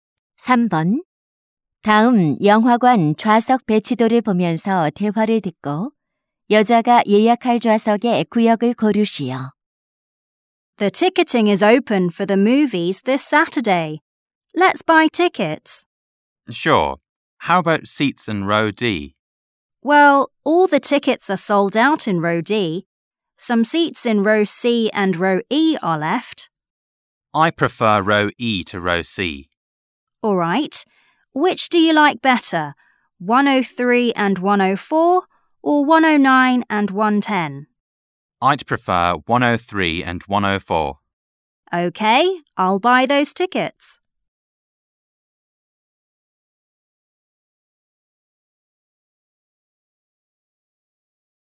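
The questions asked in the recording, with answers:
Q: 다음 영화관 좌석 배치도를 보면서 대화를 듣고 여자가 예약할 좌석의 구역을 고르시오.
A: E열 103, 104번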